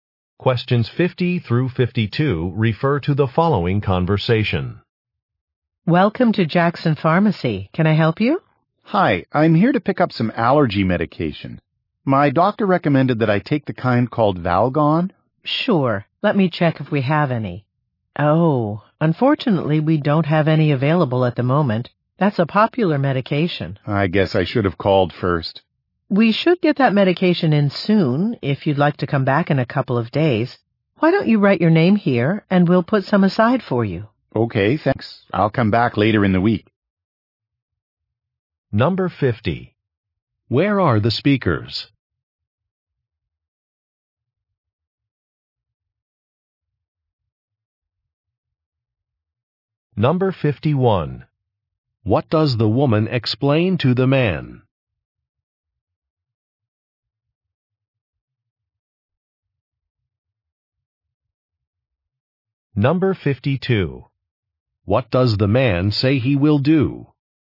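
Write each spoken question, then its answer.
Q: Where are the speakers?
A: At a pharmacy

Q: What does the woman explain to the man?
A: The medication is not available right now

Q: What does the man say he will do?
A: Come back later in the week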